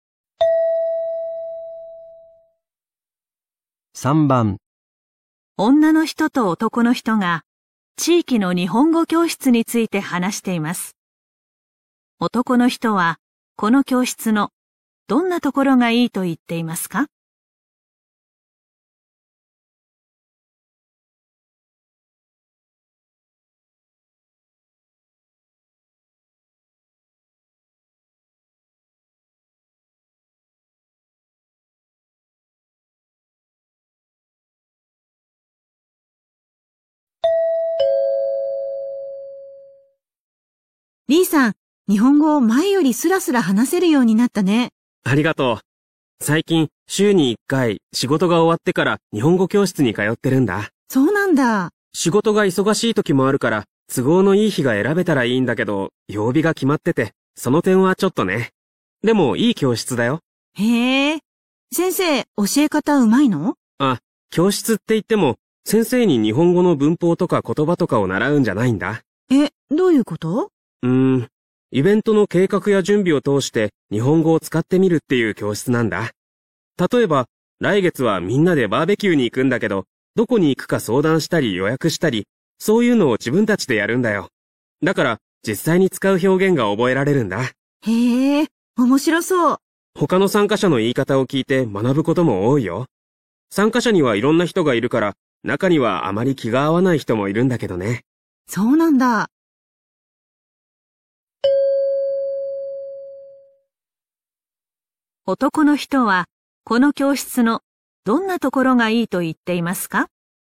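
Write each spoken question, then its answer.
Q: 男の人は、この教室のどんなところがいいと言っていますか?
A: イベントの準備を通して実際に使う表現が覚えられる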